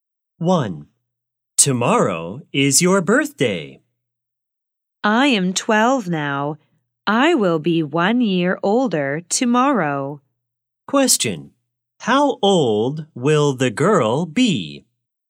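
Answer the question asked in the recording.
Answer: 13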